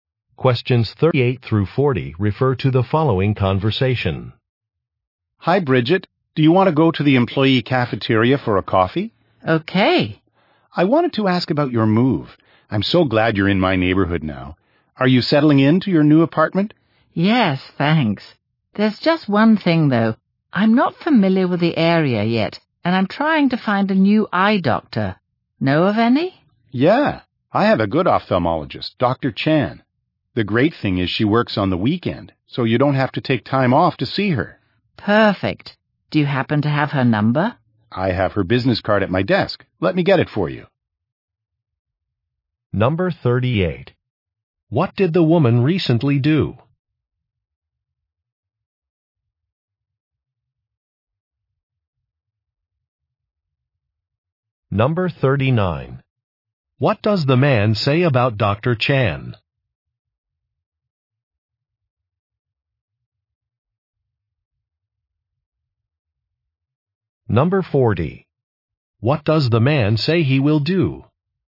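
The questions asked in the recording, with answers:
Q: What did the woman recently do?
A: She moved to a new apartment

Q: What does the man say about Dr.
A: She works on the weekend

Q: What does the man say he will do?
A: Get Dr. Chan's business card from his desk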